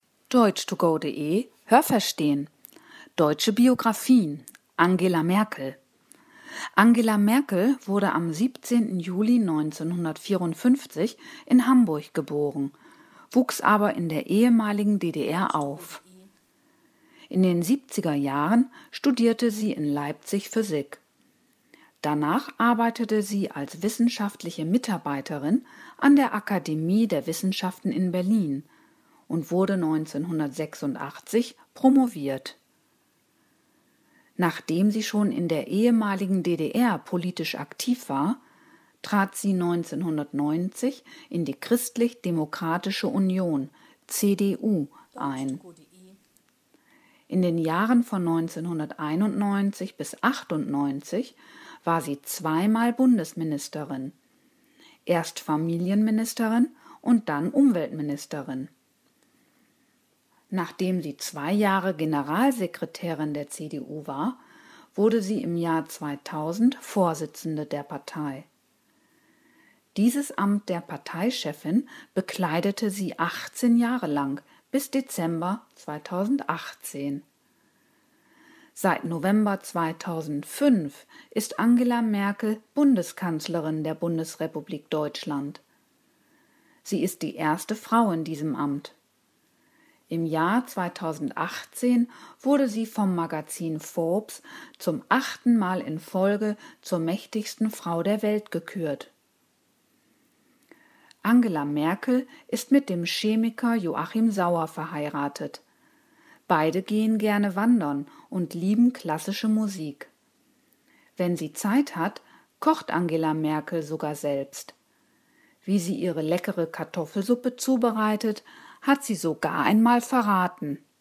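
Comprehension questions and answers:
Haben Sie das gehört? Stimmt diese Aussage?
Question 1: Angela Merkel studierte Physik in Leipzig und promovierte 1986 in Berlin.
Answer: Ja, das habe ich gehört.

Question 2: 1990 trat Angela Merkel in die Sozialdemokratische Partei Deutschlands ein.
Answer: Nein, das habe ich nicht gehört.

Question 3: Sie war in den neunziger Jahren Justizministerin und Gesundheitsministerin.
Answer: Nein, das habe ich nicht gehört.

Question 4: Angela Merkel war 18 Jahre lang Parteivorsitzende der CDU.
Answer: Ja, das habe ich gehört.

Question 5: 2005 wurde Angela Merkel Bundeskanzlerin der Bundesrepublik Deutschland.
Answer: Ja, das habe ich gehört.

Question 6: Das US-Magazin „Forbes" wählte Angela Merkel 2018 schon zum achten Mal hintereinander zur mächtigsten Frau der Welt.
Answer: Ja, das habe ich gehört.

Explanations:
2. Sie trat in die Christlich Demokratische Union (CDU) ein.
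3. Sie war zunächst Familienministerin und dann Umweltministerin.

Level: C1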